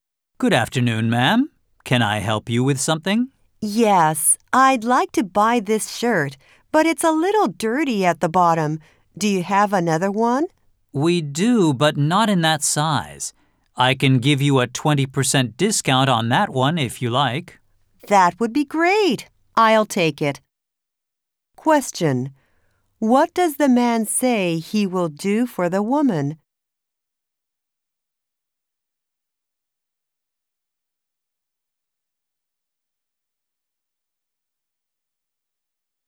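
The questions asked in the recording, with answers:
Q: What does the man say he will do for the woman?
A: Give her a 20% discount on the shirt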